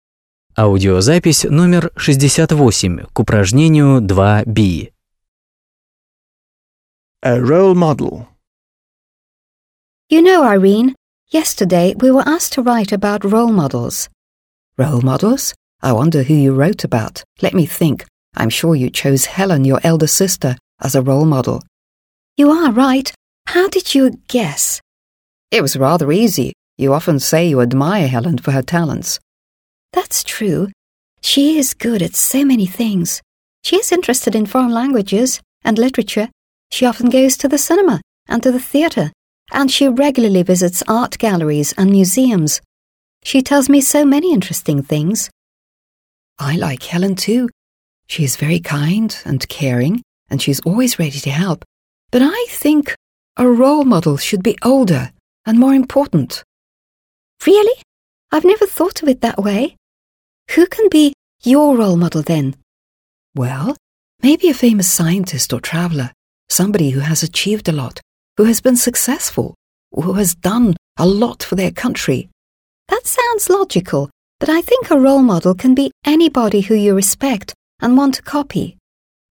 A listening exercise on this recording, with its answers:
B. Listen to the dialogue, (68), and explain why Ann has chosen her elder sister as a role model.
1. explain why Ann has chosen her elder sister as a role model.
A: Ann admires her sister for her talents.

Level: 8 класс